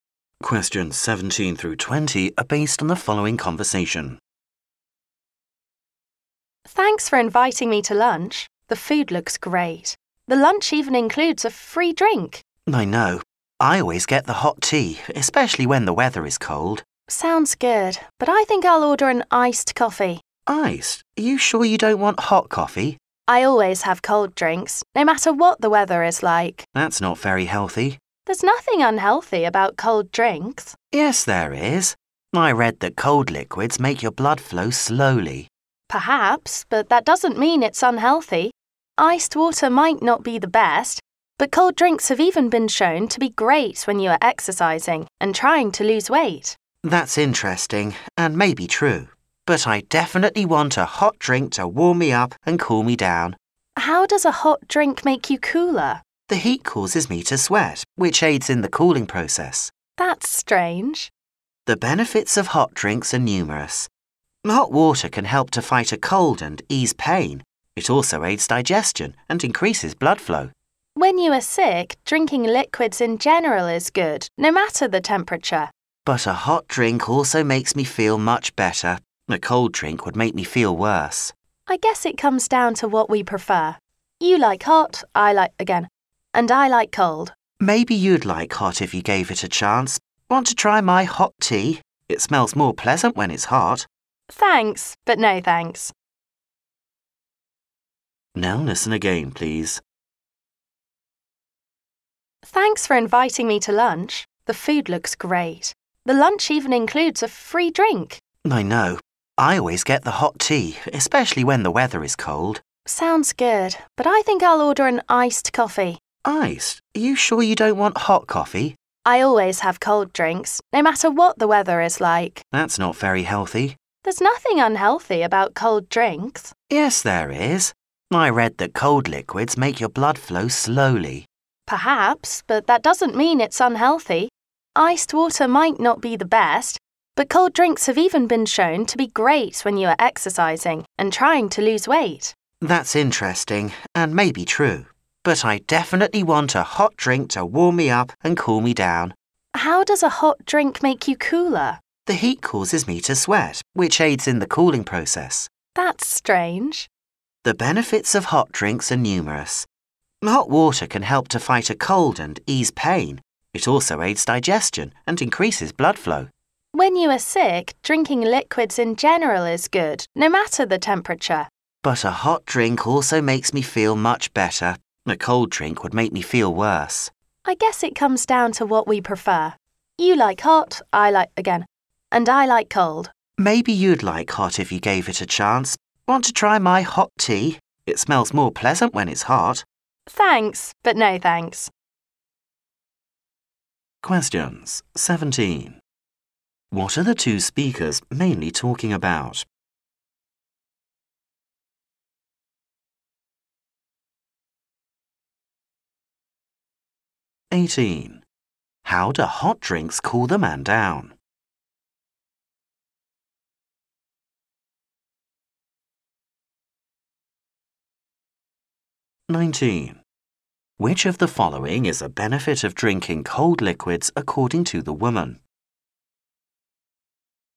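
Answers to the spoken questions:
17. Hot drinks versus cold drinks
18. By making him sweat
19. They help when exercising and trying to lose weight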